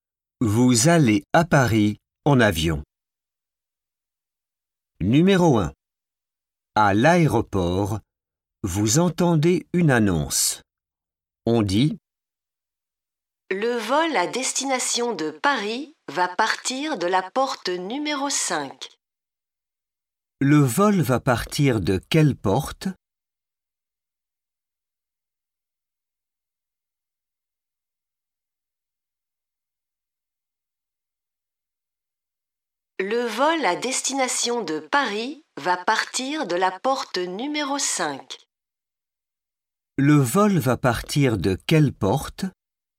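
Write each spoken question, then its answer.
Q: Le vol va partir de quelle porte ?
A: La porte numéro 5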